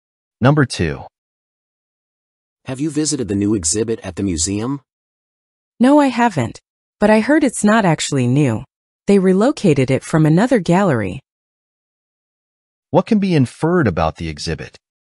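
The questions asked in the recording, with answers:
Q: What can be inferred about the exhibit?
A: It was moved from another gallery, so it isn't really new.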